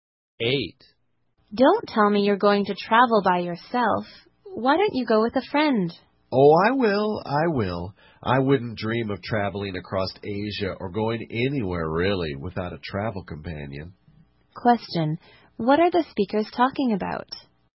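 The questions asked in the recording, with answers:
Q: What are the speakers talking about?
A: Traveling with a companion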